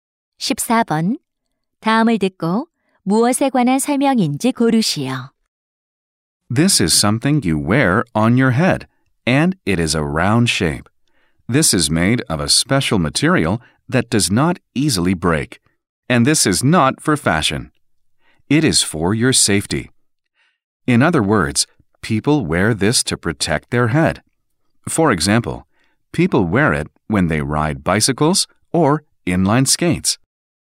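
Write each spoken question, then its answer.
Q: 다음을 듣고 무엇에 관한 설명인지 고르시오.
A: 헬멧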